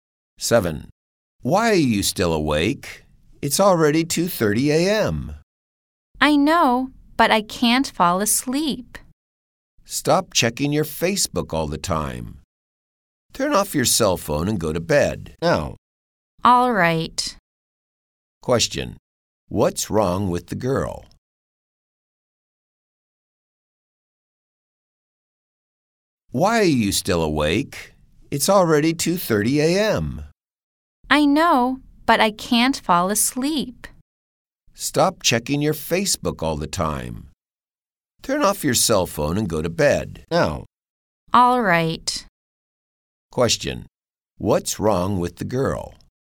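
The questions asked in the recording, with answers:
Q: Question. What's wrong with the girl?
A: She can't fall asleep because she keeps checking Facebook.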